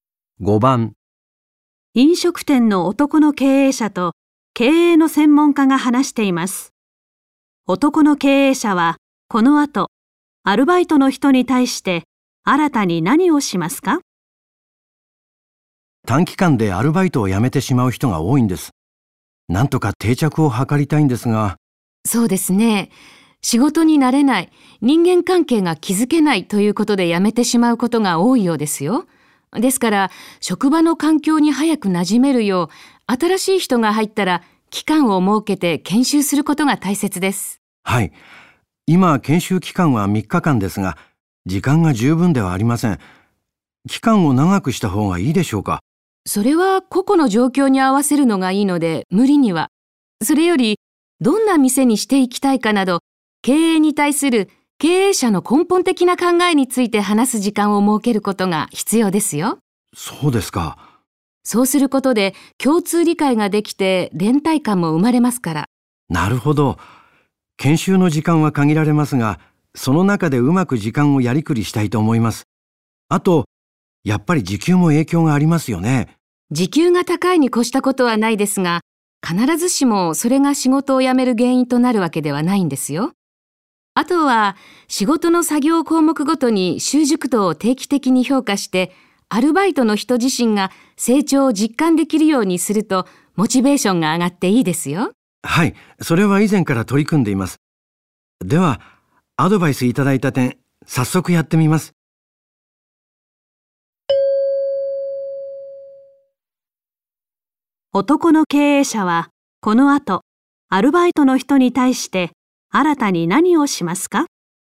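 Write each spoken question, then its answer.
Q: 男の経営者はこの後アルバイトの人に対して新たに何をしますか?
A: 研修で経営についての自分の考えを話す時間を設ける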